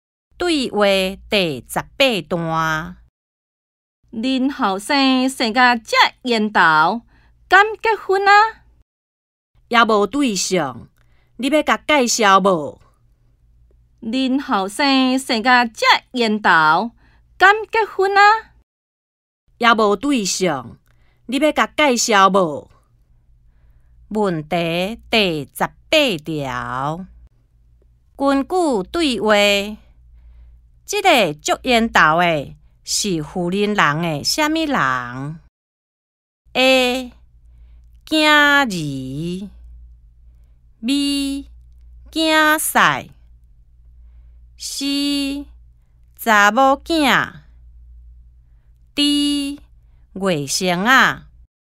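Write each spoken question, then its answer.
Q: 根据对话,这个遮缘投的是富人人的什么人?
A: A: 囝儿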